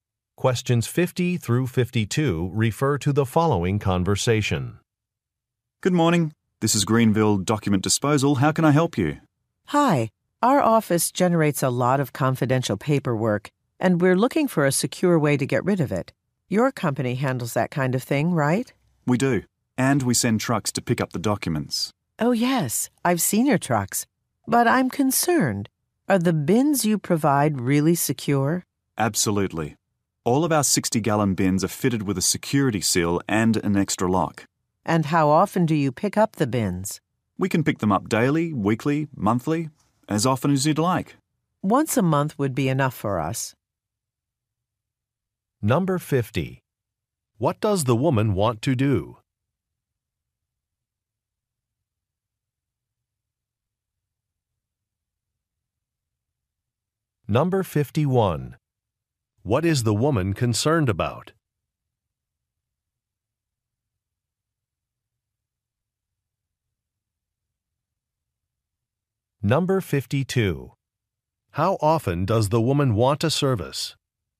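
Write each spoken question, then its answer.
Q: What does the woman want to do?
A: Dispose of confidential documents securely

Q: What is the woman concerned about?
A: Whether the bins are secure

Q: How often does the woman want a service?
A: Once a month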